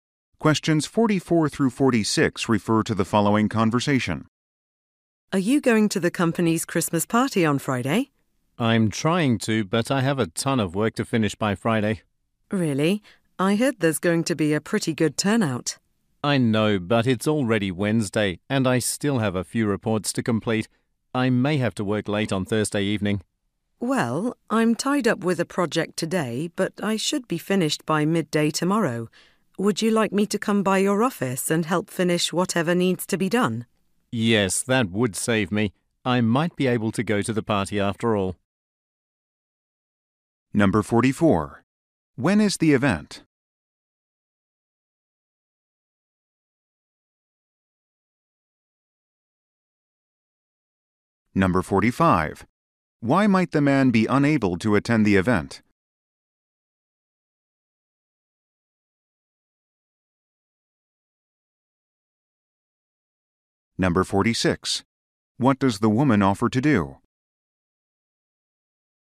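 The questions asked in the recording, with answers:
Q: When is the event?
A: Friday

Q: Why might the man be unable to attend the event?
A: He has a lot of work (reports) to finish

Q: What does the woman offer to do?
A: Help him finish his work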